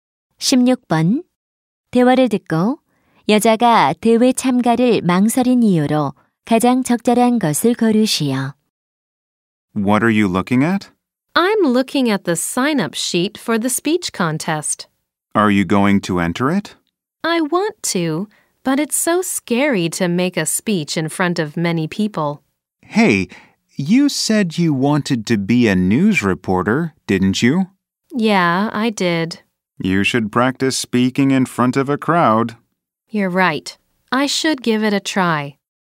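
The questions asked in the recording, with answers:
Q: 대화를 듣고 여자가 대회 참가를 망설인 이유로 가장 적절한 것을 고르시오.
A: 많은 사람 앞에서 말하는 것이 무서워서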